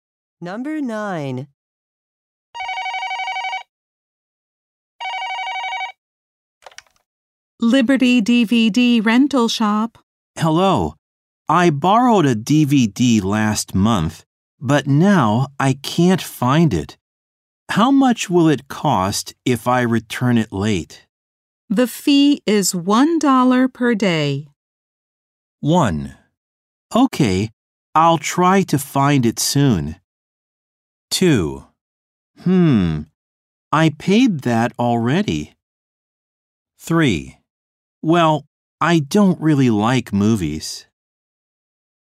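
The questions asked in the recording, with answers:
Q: The fee is $1 per day.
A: 1: Okay, I'll try to find it soon.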